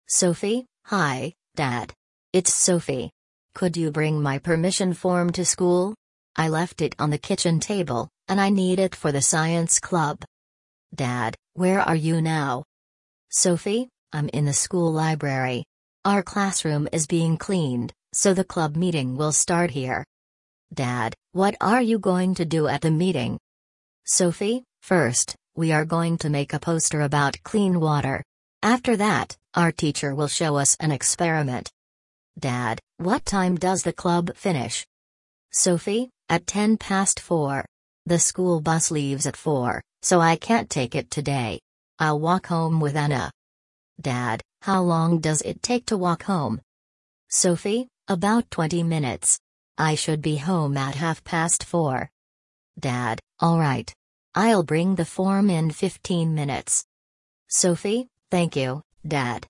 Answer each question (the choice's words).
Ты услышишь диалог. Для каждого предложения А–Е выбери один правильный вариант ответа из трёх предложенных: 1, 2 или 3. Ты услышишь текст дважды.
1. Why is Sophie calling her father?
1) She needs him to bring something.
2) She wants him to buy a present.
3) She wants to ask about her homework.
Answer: She needs him to bring something.

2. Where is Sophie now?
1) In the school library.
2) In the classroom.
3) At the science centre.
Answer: In the school library.

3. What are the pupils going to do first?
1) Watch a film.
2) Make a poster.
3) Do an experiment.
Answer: Make a poster.

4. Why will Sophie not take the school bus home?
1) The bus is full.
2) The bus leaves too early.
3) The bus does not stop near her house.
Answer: The bus leaves too early.

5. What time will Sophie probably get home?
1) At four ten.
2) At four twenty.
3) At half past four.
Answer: At half past four.

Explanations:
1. Sophie просит отца принести разрешение, которое она оставила дома.
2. Sophie находится в школьной библиотеке.
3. Сначала ученики будут делать плакат, а затем проведут опыт.
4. Автобус уезжает в четыре часа, а занятие заканчивается в десять минут пятого.
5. Занятие заканчивается в 4:10, а дорога занимает около двадцати минут. Sophie придёт домой примерно в 4:30.

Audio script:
Sophie: Hi, Dad. It's Sophie. Could you bring my permission form to school? I left it on the kitchen table, and I need it for the science club.
Dad: Where are you now?
Sophie: I'm in the school library. Our classroom is being cleaned, so the club meeting will start here.
Dad: What are you going to do at the meeting?
Sophie: First, we are going to make a poster about clean water. After that, our teacher will show us an experiment.
Dad: What time does the club finish?
The school bus leaves at four, so I can't take it today. I'll walk home with Anna.
Dad: How long does it take to walk home?
Sophie: About twenty minutes. I should be home at half past four.

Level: 4 классе